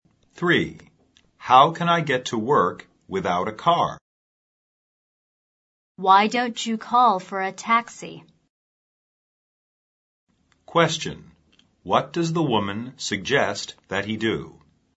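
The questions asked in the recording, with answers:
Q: What does the woman suggest that he do?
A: Call for a taxi.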